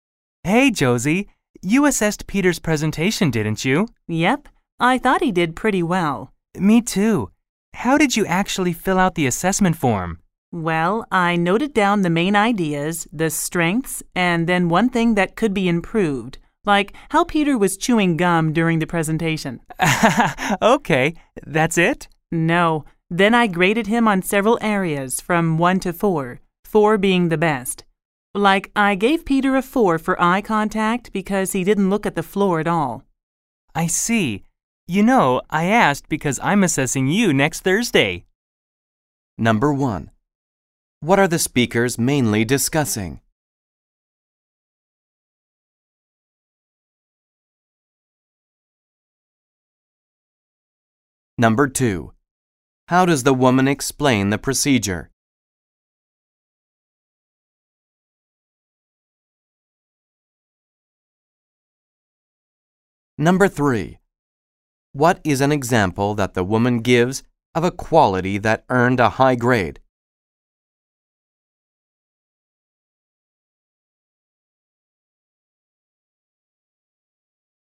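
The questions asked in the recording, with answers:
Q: What are the speakers mainly discussing?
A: How to fill out the assessment form for a classmate's presentation

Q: What is an example that the woman gives of a quality that earned a high grade?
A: Peter's eye contact (he never looked at the floor)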